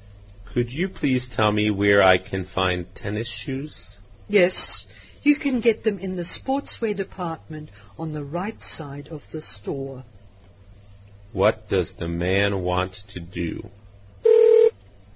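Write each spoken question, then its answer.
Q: What does the man want to do?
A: Buy tennis shoes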